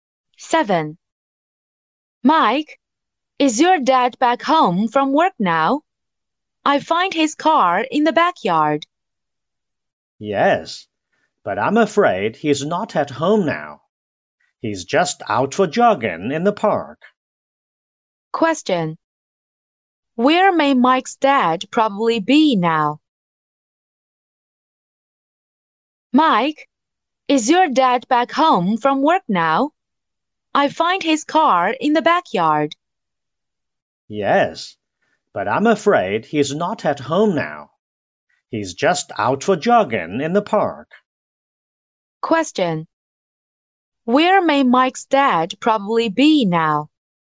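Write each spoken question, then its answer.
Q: Where may Mike's dad probably be now?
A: In the park (jogging).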